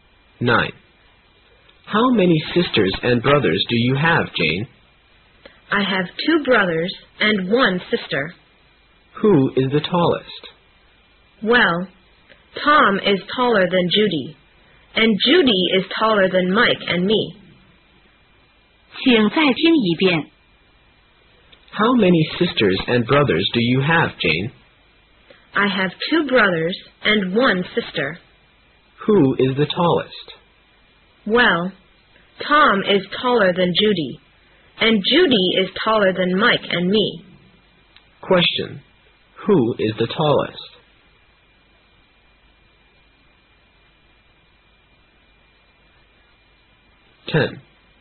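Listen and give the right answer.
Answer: Tom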